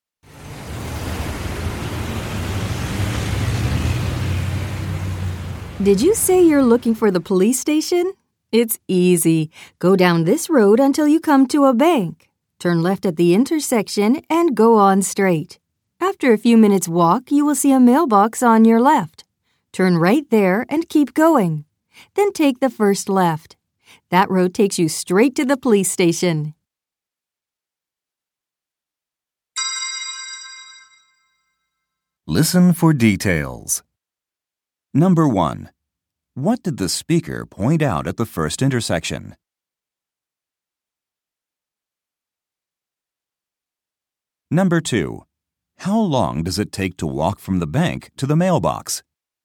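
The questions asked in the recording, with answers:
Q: What did the speaker point out at the first intersection?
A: a bank

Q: How long does it take to walk from the bank to the mailbox?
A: a few minutes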